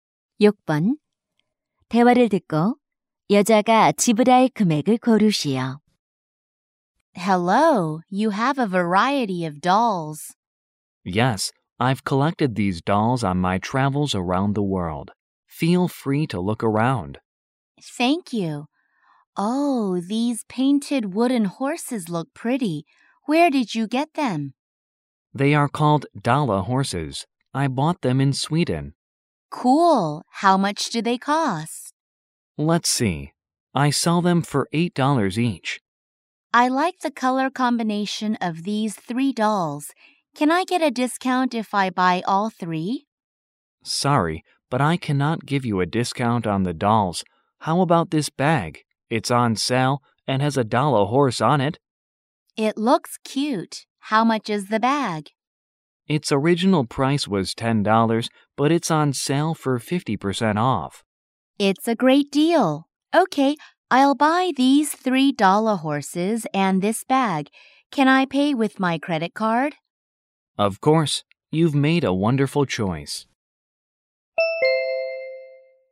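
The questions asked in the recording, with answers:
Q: 대화를 듣고 여자가 지불할 금액을 고르시오.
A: 29달러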